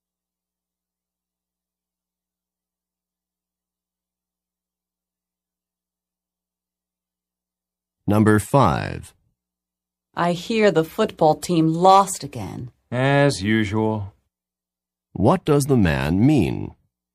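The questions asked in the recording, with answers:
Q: What does the man mean?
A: The team often loses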